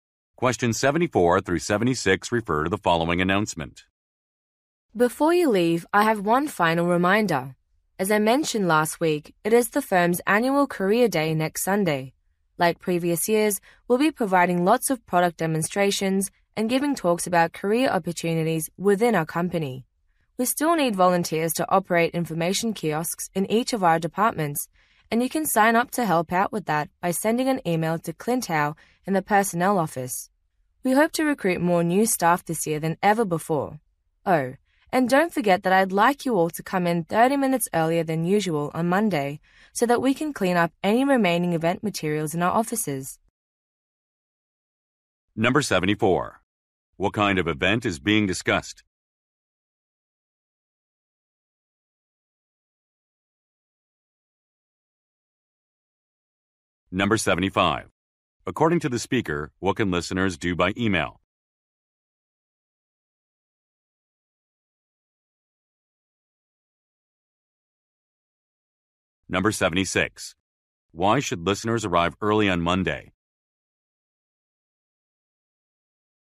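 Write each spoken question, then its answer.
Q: What kind of event is being discussed?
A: A career day

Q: According to the speaker, what can listeners do by email?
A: Volunteer to run information kiosks

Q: Why should listeners arrive early on Monday?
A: To clean up remaining event materials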